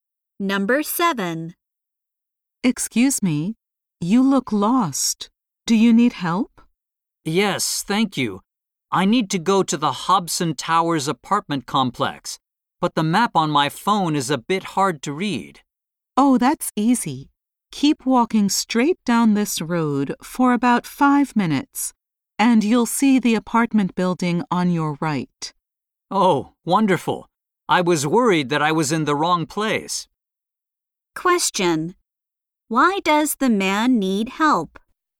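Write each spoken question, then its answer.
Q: Why does the man need help?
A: The map on his phone is hard to read.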